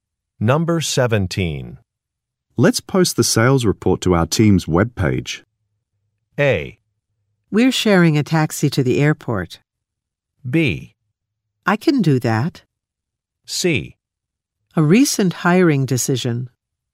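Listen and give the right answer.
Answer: B: I can do that.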